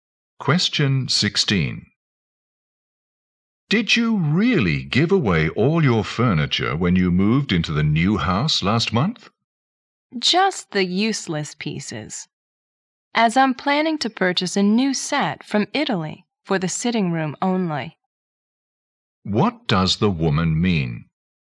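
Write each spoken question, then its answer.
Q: What does the woman mean?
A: She gave away only the useless furniture and plans to buy a new set from Italy for the sitting room.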